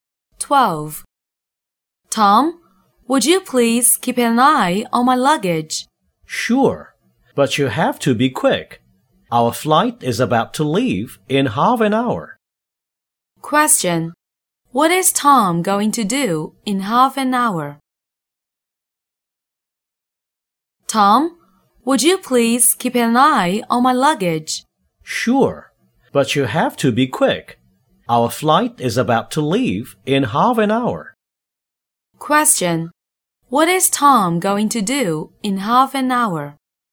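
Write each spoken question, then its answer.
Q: What is Tom going to do in half an hour?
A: Take a flight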